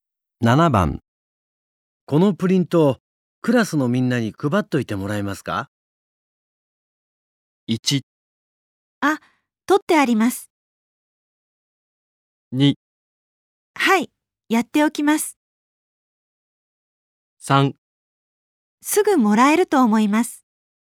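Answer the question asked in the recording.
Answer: 2: はい、やっておきます。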